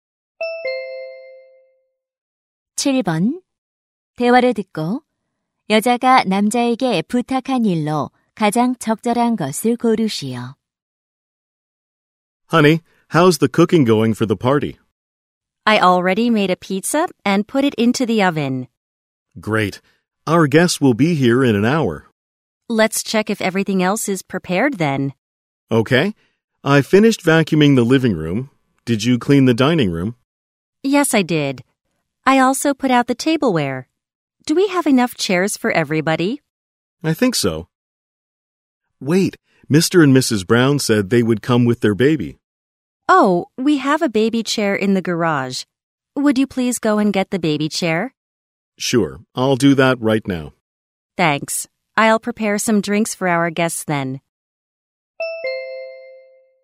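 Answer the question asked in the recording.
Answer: 차고에서 아기 의자 가져오기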